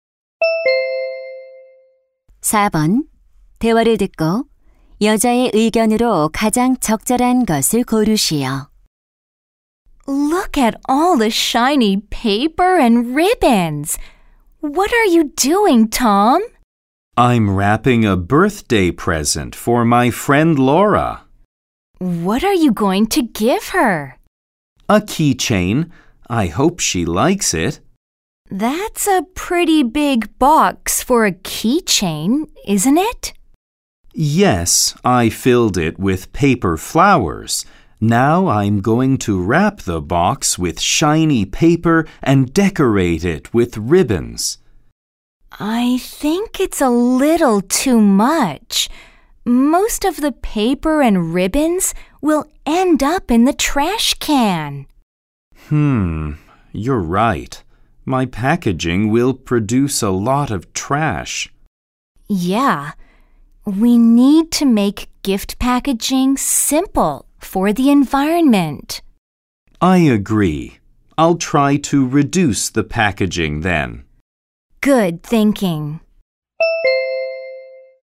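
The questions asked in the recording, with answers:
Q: 대화를 듣고 여자의 의견으로 가장 적절한 것을 고르시오.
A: 환경을 위해 선물 포장을 간소화해야 한다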